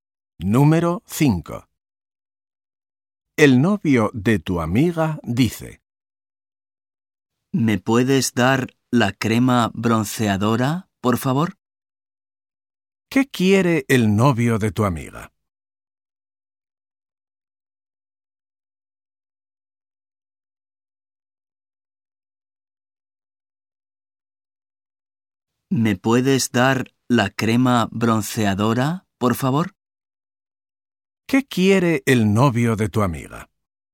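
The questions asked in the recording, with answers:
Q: ¿Qué quiere el novio de tu amiga?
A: La crema bronceadora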